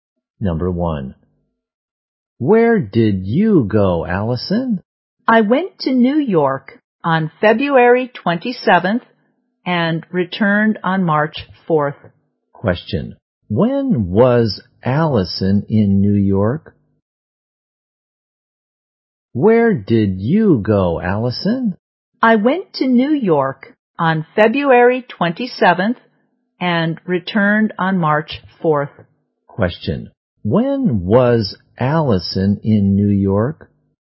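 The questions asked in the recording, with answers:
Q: When was Allison in New York?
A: From February 27th to March 4th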